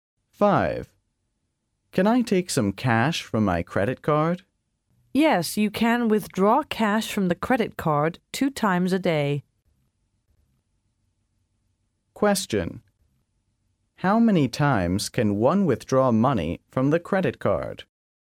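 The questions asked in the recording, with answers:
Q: How many times can one withdraw money from the credit card?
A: 2 times a day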